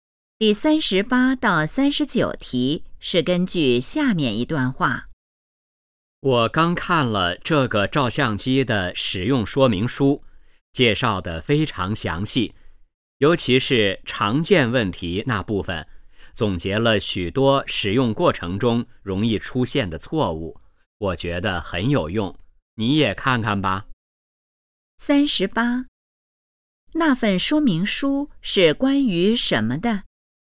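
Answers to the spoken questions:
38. 照相机
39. 很详细,很有用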